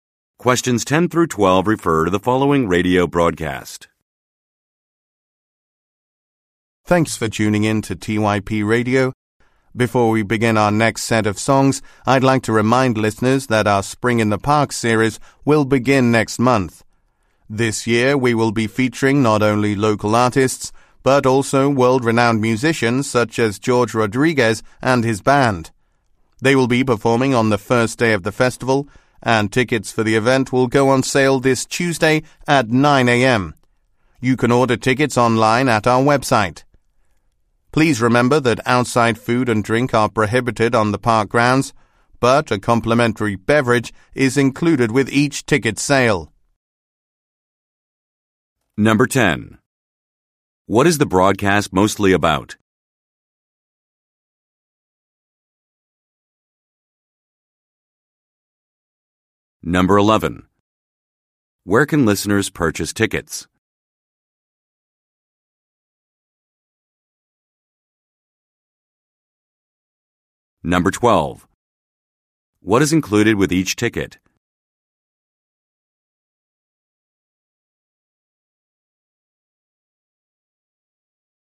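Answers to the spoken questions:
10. The upcoming Spring in the Park music series
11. Online at the station's website
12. A free drink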